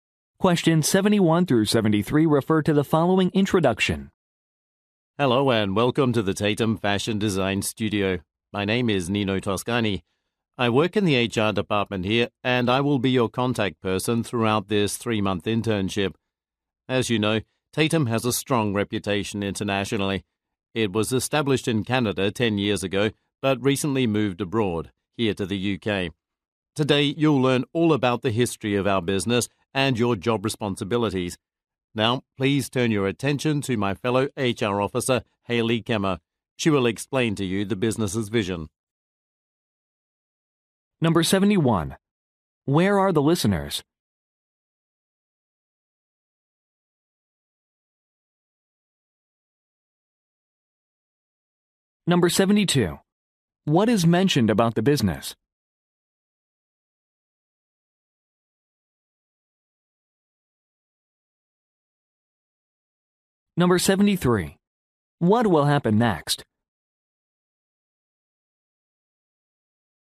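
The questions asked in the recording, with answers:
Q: Where are the listeners?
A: At the Tatum Fashion Design Studio, for an internship orientation

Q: What is mentioned about the business?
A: It recently moved from Canada to the UK

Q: What will happen next?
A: Hayley Kemmer will explain the business's vision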